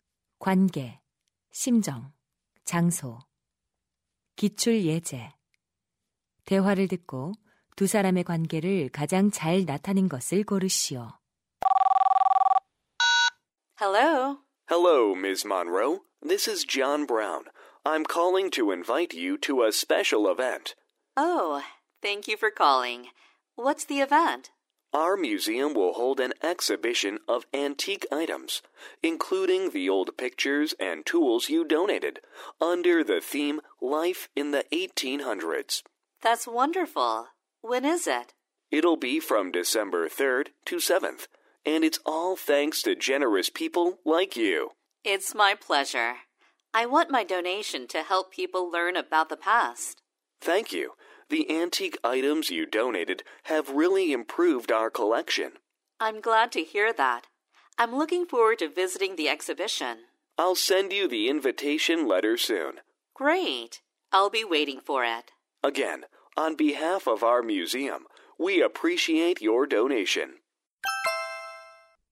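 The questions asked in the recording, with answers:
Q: 대화를 듣고 두 사람의 관계를 가장 잘 나타낸 것을 고르시오.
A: 박물관 직원 – 기증자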